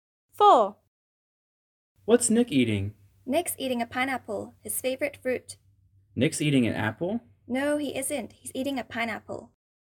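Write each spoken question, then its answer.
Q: What's Nick eating?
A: a pineapple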